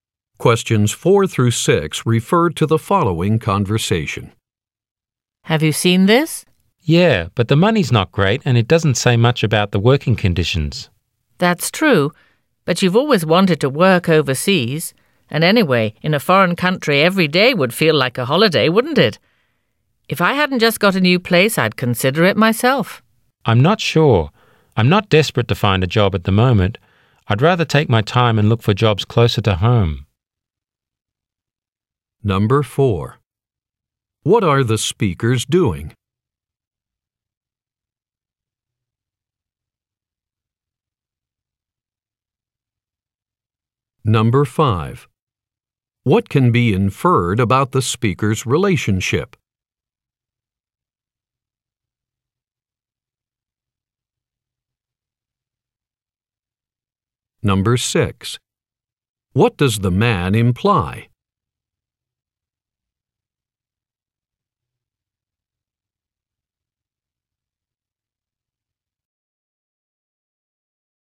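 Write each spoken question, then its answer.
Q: What are the speakers doing?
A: Discussing a job advertisement for work overseas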